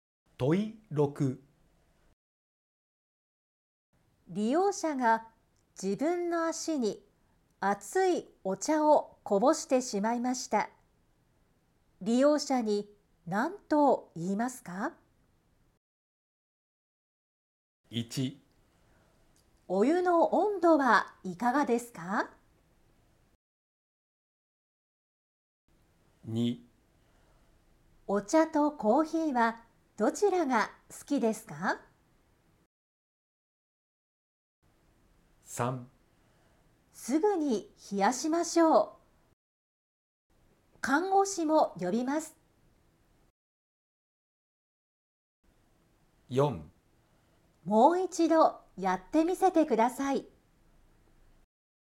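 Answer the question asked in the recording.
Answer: 3: すぐに冷やしましょう。看護師も呼びます。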